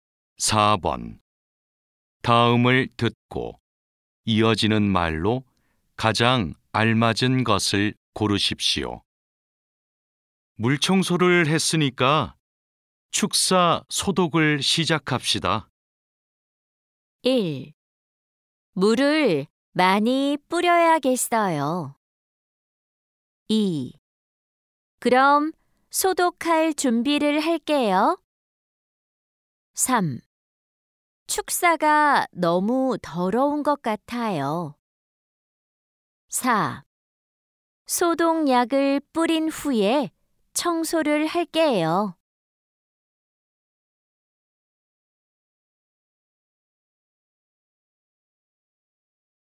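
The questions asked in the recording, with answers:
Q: 다음을 듣고 이어지는 말로 가장 알맞은 것을 고르십시오.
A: 2: 그럼 소독할 준비를 할게요.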